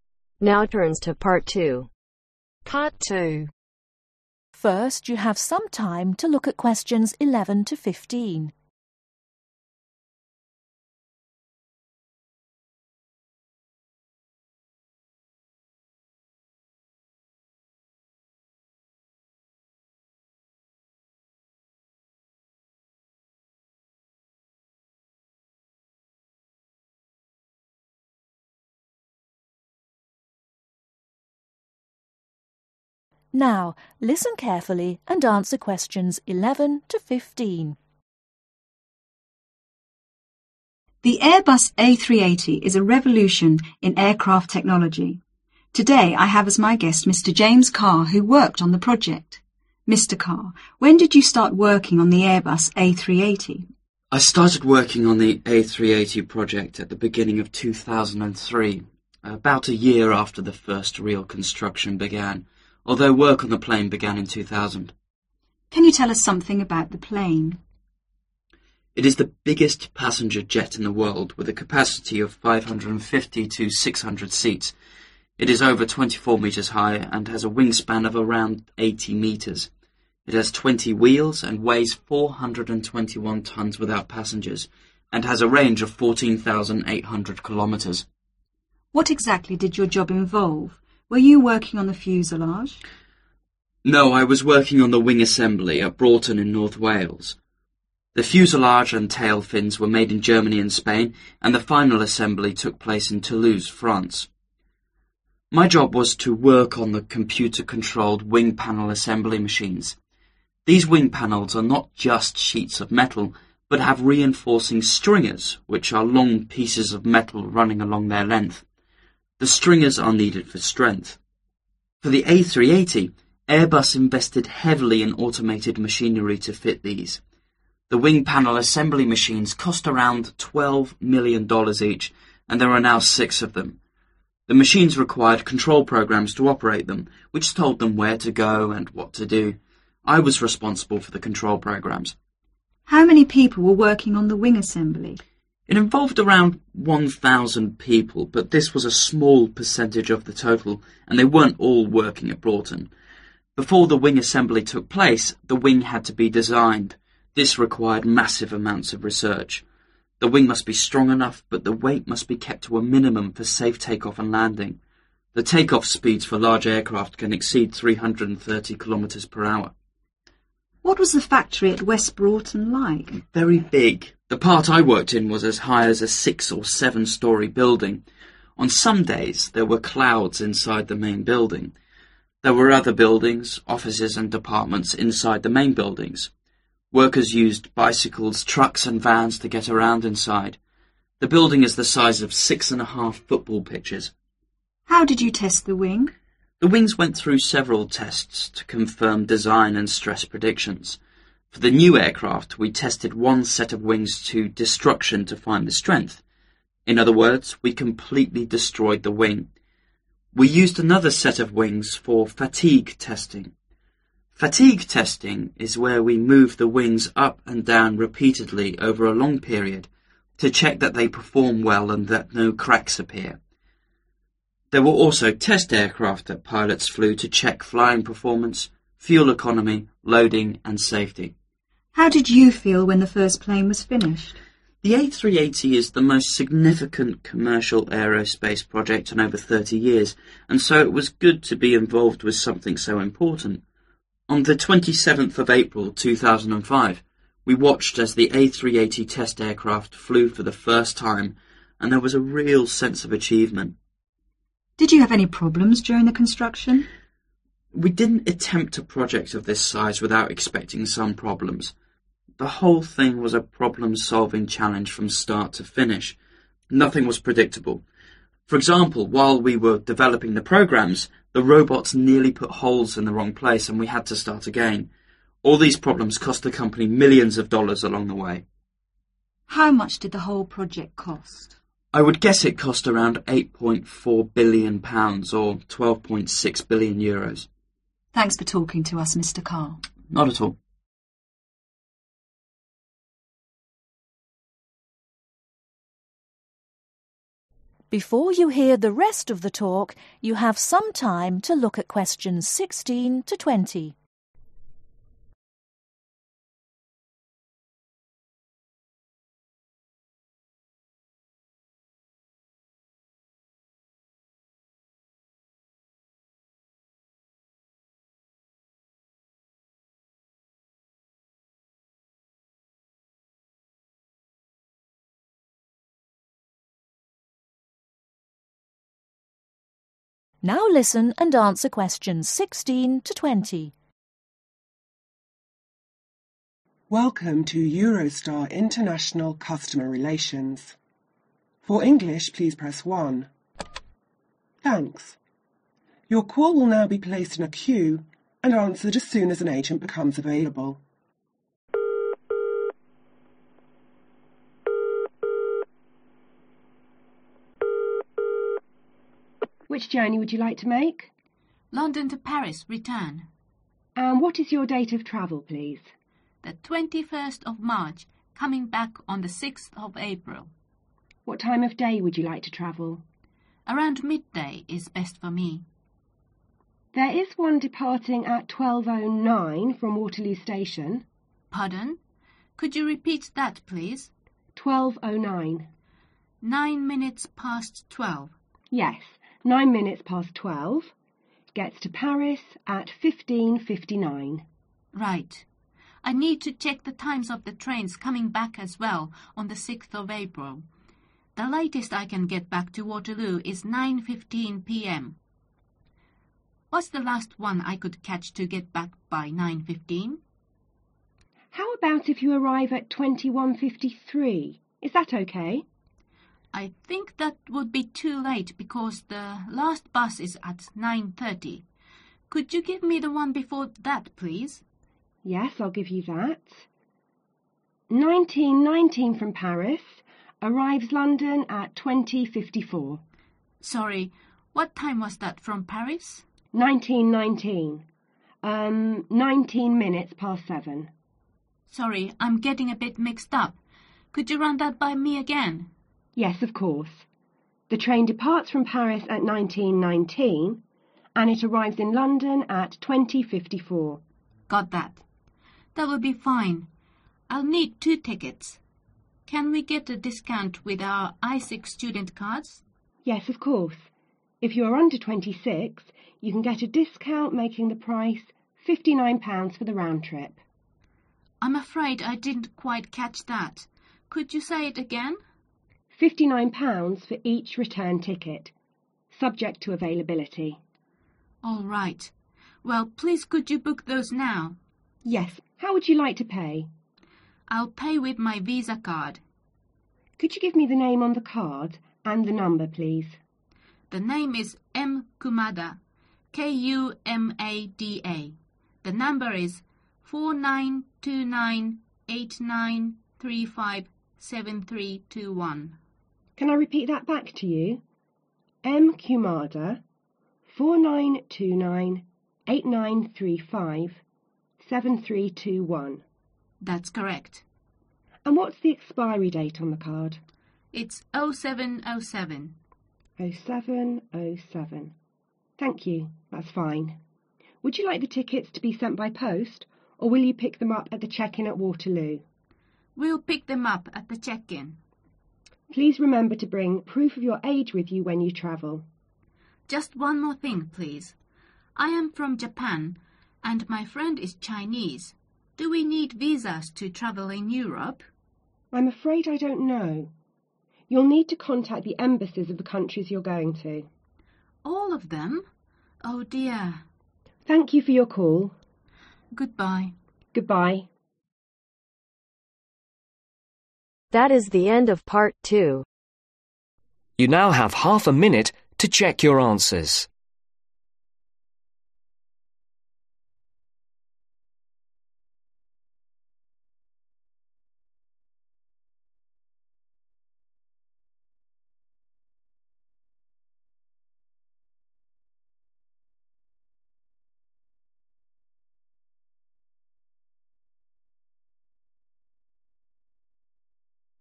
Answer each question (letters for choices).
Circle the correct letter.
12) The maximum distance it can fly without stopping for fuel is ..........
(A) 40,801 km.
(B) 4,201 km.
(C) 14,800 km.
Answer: C

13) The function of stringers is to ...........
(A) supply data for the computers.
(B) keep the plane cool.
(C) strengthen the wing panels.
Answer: C

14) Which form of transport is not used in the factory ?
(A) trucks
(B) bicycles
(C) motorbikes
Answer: C

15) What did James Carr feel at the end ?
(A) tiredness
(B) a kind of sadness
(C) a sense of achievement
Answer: C

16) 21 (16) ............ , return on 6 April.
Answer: MARCH

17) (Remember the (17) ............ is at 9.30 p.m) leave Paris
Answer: BUS

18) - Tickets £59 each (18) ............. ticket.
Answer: RETURN

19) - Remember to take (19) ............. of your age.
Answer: PROOF

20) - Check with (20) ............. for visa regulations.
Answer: EMBASSIES